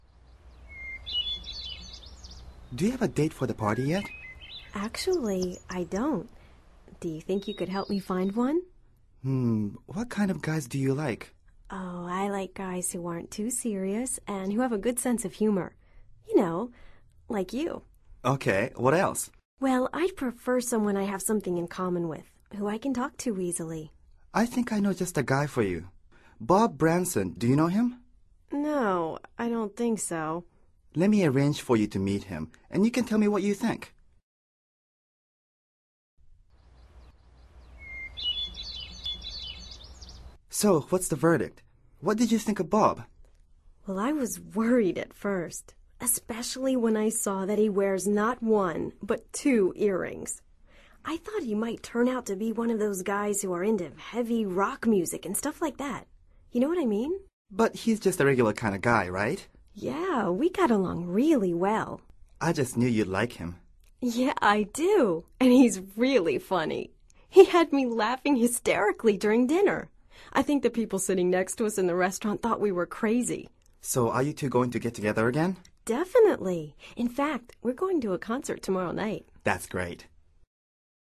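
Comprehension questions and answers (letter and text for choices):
Activity 39: Basándote en los comentarios anteriores, selecciona las opciones más adecuadas para cada oración. Verifica luego las respuestas correctas.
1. In this conversation, Ted is acting as ...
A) dancing partner.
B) fellow worker.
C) a matchmaker.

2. What doesn't Lina have for the party?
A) a date for the party.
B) a roommate.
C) a partner for dancing.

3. Lina prefers a guy who ...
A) doesn't wear earrings.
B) has a good sense of humor.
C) goes to concerts.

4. Bob Branson turned out to be someone ...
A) who loves heavy rock music.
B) who laughs hysterically.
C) really funny.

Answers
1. C) a matchmaker.
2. A) a date for the party.
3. B) has a good sense of humor.
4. C) really funny.

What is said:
Do you have a date for the party yet?
Actually, I don't ... Do you think you could help me find one?
Hmm. What kind of guys do you like?
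Oh, I like guys who aren't too serious and who have a good sense of humor. You know, ... like you.
OK. What else?
Well, I'd prefer someone I have something in common with – who I can talk to easily.
I think I know just the guy for you. Bob Branson. Do you know him?
No, I don't think so.
Let me arrange for you to meet him, and you can tell me what you think.
So, what's the verdict? What did you think of Bob?
Well, I was worried at first – especially when I saw that he wears not one but two earrings. I thought he might turn out to be one of those guys who are into the heavy rock music and stuff like that. You know what I mean?
But he's just a regular kind of guy, right?
Yeah, we got along really well!
I just knew you'd like him.
Yeah, I do. And he's really funny. He had me laughing hysterically during dinner. I think the people sitting next to us in the restaurant thought we were crazy.
So are you two going to get together again?
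Definitely. In fact, we're going to a concert tomorrow night.

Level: Nivel Avanzado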